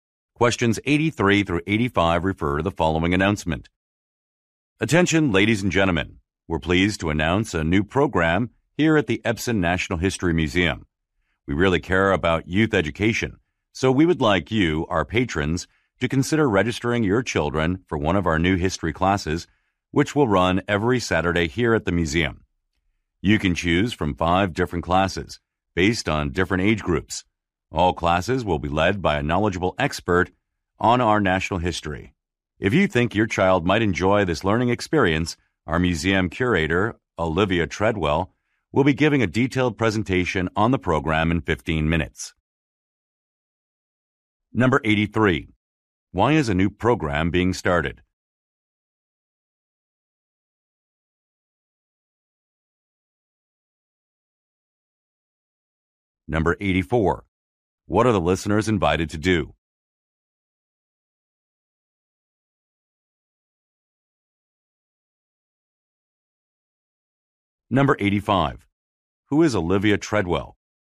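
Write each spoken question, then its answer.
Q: Why is a new program being started?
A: The museum cares about youth education

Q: What are the listeners invited to do?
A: Register their children for history classes

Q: Who is Olivia Treadwell?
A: The museum curator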